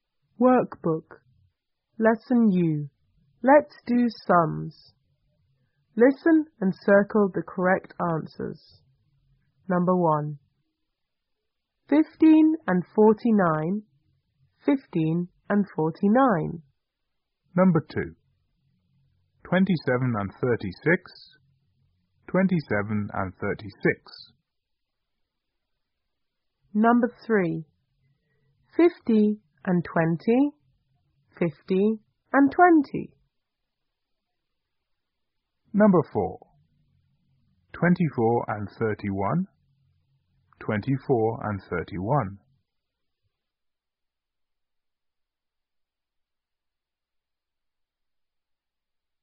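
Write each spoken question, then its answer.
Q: 15 and 49. 15 and 49.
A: 64

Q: 27 and 36. 27 and 36.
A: 63

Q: 50 and 20, 50 and 20.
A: 70

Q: 24 and 31, 24 and 31.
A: 55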